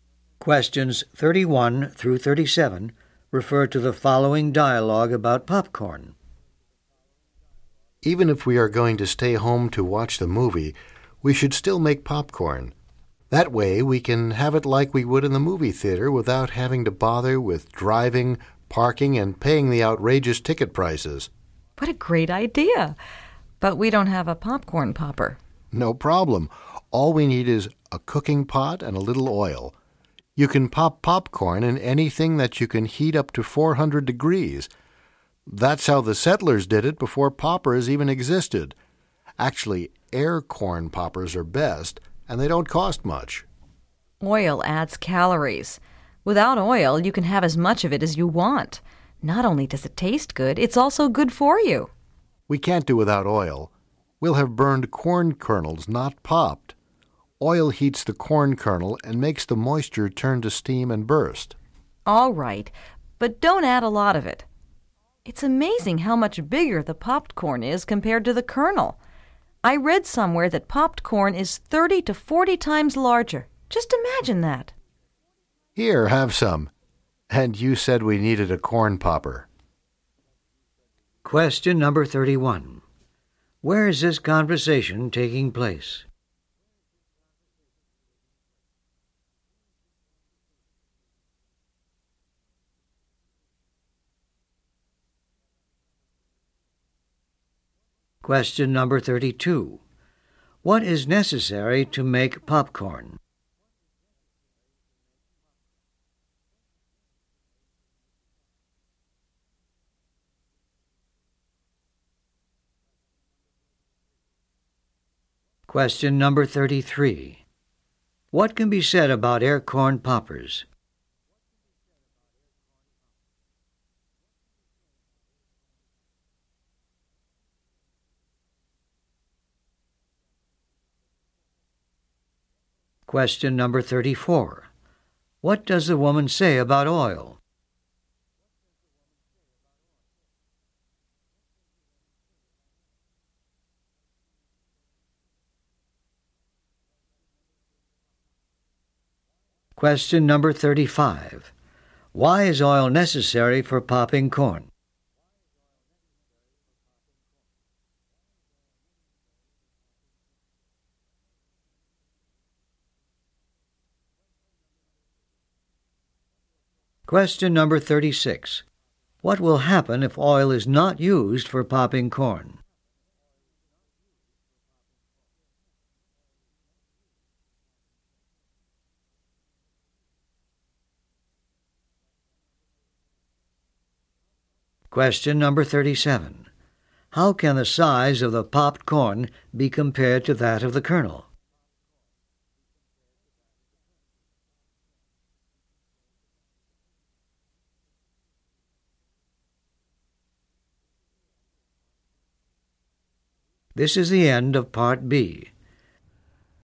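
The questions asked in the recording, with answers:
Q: What is necessary to make popcorn?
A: A cooking pot and a little oil

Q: What can be said about air corn poppers?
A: They are best and don't cost much

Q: Why is oil necessary for popping corn?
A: It heats the kernel so the moisture turns to steam and bursts

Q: What will happen if oil is not used for popping corn?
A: The kernels will burn instead of popping

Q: How can the size of the popped corn be compared to that of the kernel?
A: It is 30 to 40 times larger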